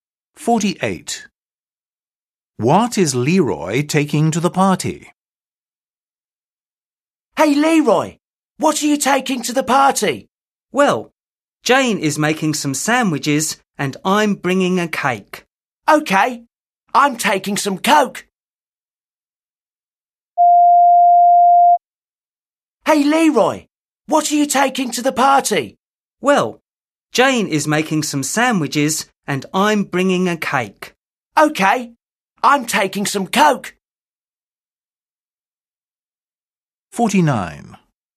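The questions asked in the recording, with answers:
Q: What is Leroy taking to the party?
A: a cake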